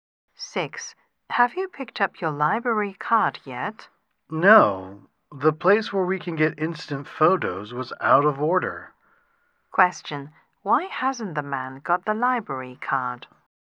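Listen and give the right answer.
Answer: The instant photo machine was out of order.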